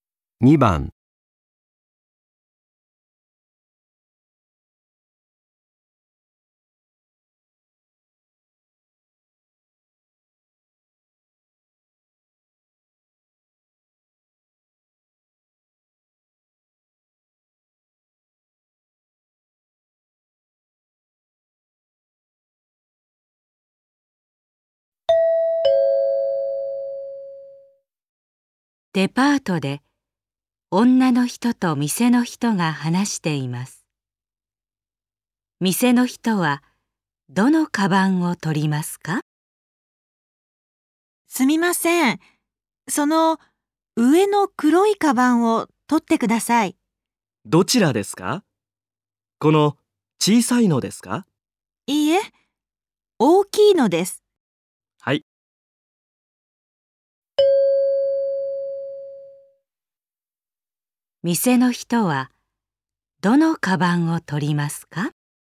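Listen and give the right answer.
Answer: 上の大きい黒いカバン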